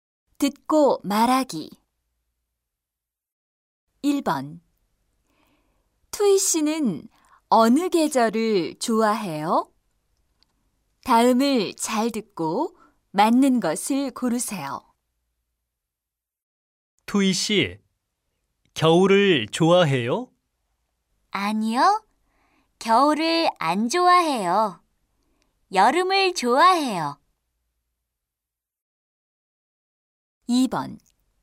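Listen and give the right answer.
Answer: 여름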